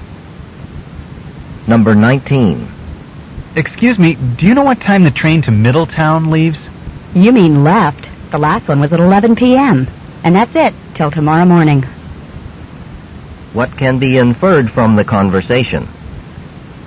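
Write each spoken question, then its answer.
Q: What can be inferred from the conversation?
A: The man has missed the last train until tomorrow morning.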